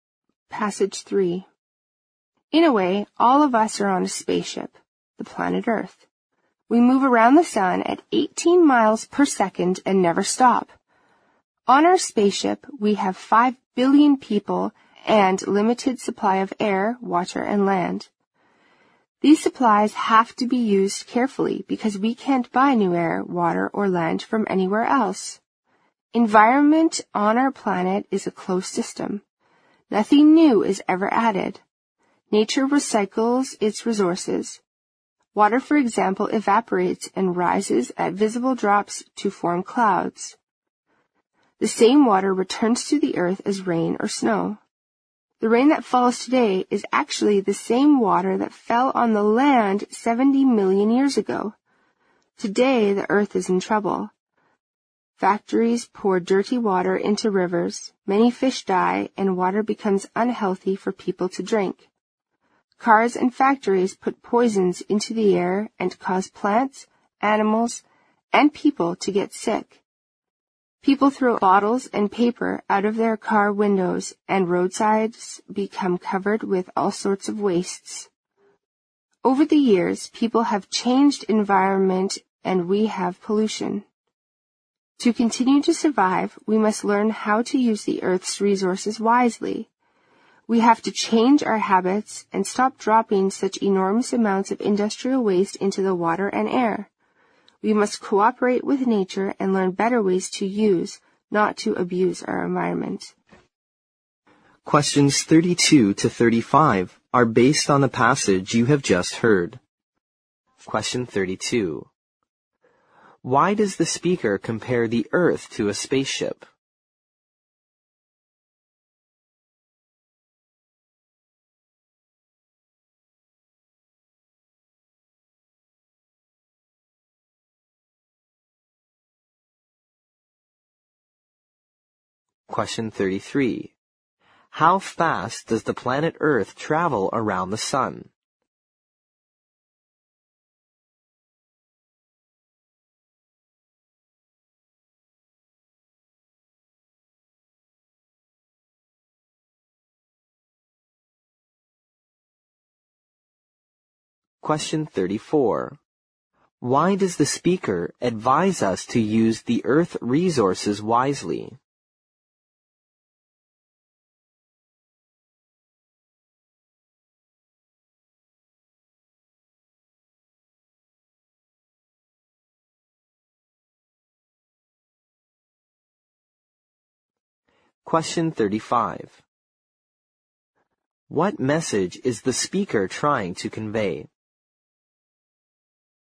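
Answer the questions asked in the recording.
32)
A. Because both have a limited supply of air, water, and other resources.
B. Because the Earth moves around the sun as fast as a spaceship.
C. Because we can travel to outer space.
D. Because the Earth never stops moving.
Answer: A. Because both have a limited supply of air, water, and other resources.
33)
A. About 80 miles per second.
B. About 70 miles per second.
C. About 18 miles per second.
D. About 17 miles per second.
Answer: C. About 18 miles per second.
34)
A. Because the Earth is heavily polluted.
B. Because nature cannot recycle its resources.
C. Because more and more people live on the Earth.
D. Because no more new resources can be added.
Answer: D. Because no more new resources can be added.
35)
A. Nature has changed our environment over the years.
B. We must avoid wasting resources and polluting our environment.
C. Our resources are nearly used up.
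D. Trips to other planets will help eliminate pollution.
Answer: B. We must avoid wasting resources and polluting our environment.

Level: 六级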